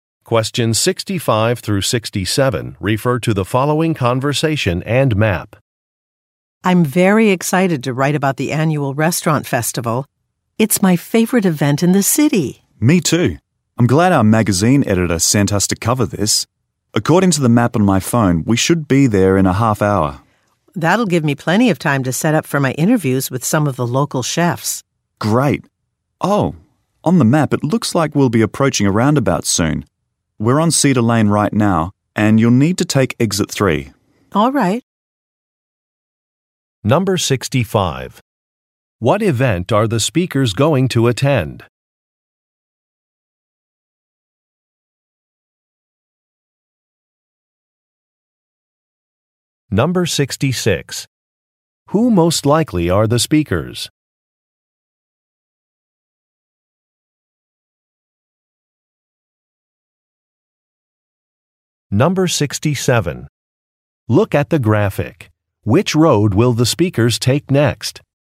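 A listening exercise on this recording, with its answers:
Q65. What event are the speakers going to attend?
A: A restaurant festival

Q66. Who most likely are the speakers?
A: Journalists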